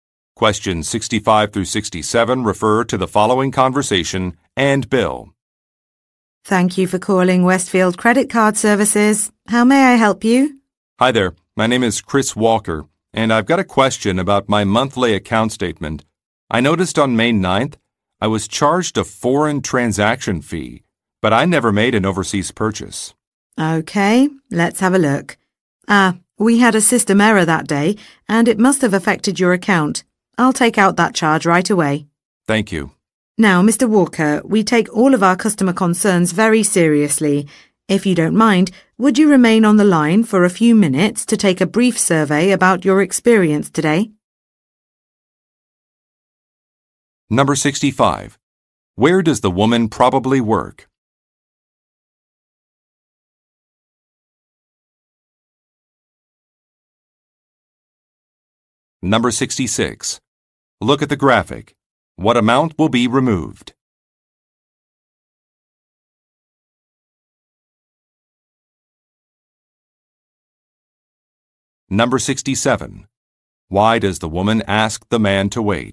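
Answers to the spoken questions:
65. At a credit card company
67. To take a brief survey about his experience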